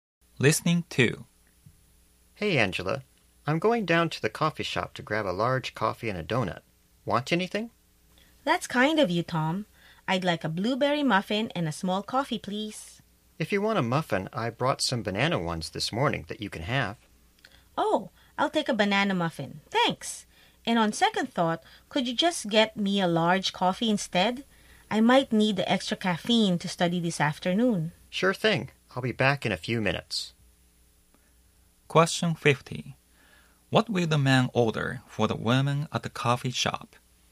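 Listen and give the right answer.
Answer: A large coffee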